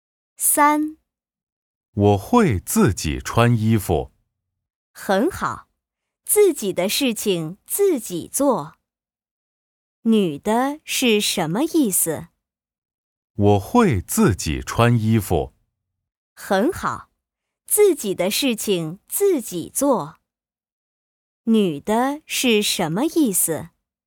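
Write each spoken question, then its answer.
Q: 女的是什么意思?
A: 自己的事情自己做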